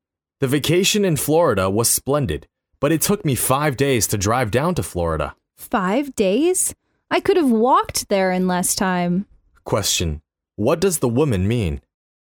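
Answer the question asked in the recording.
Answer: Five days was far too long for the drive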